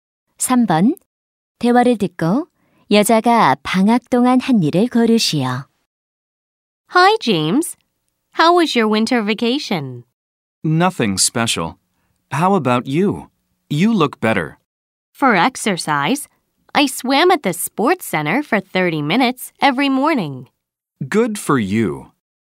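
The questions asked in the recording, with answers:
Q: 대화를 듣고 여자가 방학 동안 한 일을 고르시오.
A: 스포츠 센터에서 수영하기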